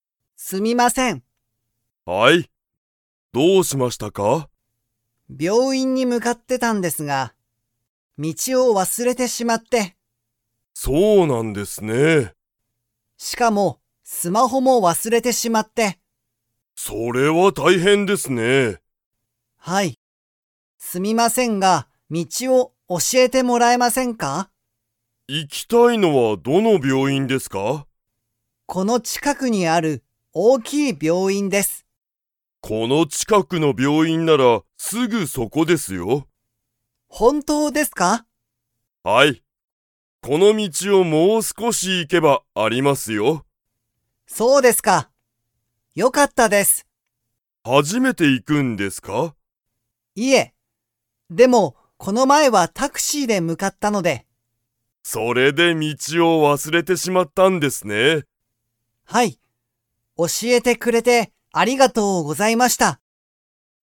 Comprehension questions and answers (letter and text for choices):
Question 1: この近(ちか)くの病院(びょういん)なら、_____。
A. すぐそこだ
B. 大変(たいへん)だ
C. 有名(ゆうめい)だ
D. 初(はじ)めてだ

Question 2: 後藤(ごとう)さんは、その病院(びょういん)に初(はじ)めて行(い)きますか?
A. はい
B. いいえ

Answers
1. A. すぐそこだ
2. B. いいえ